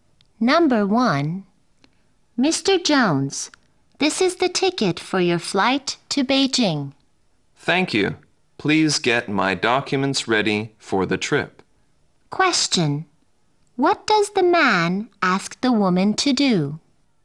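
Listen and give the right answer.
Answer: Get his documents ready for the trip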